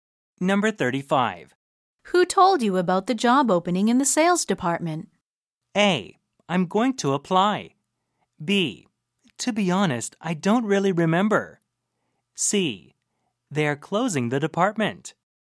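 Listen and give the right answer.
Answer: B: To be honest, I don't really remember.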